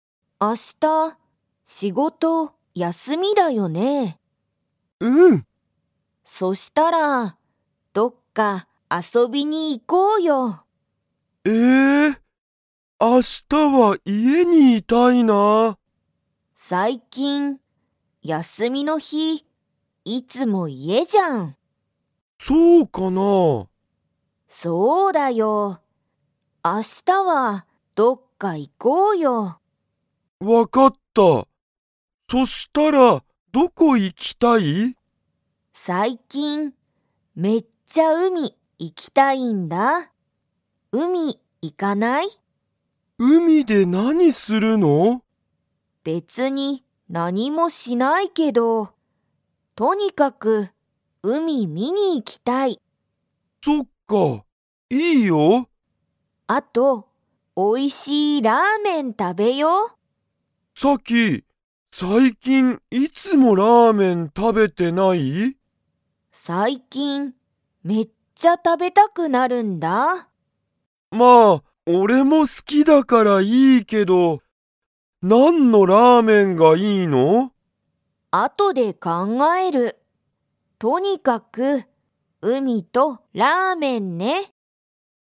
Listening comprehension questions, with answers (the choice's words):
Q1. ユウヤは最近さいきん、休やすみの日ひに____。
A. いつも家いえにいる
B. 美味おいしいものを作つくる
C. ラーメンを食たべたくない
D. 海うみに遊あそびに行いった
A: いつも家いえにいる

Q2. サキとユウヤは、明日海あしたうみに行いきますか?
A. はい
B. いいえ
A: はい

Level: Level 2